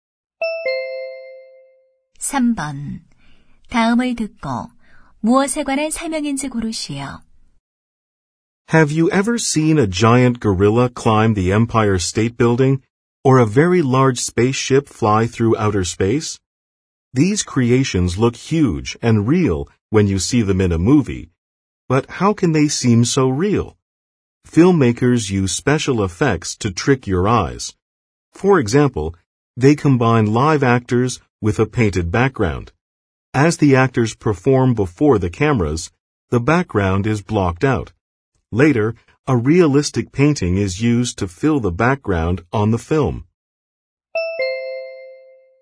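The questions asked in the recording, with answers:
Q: 다음을 듣고 무엇에 관한 설명인지 고르시오.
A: 영화의 특수 효과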